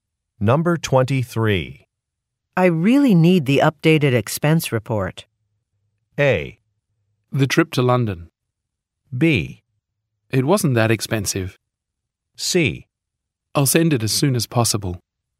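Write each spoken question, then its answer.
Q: I really need the updated expense report.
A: C: I'll send it as soon as possible.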